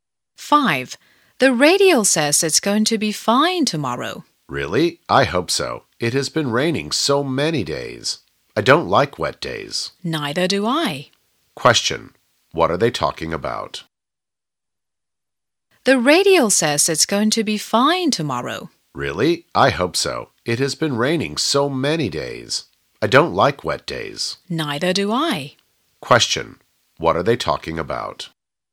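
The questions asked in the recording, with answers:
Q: What are they talking about?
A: The weather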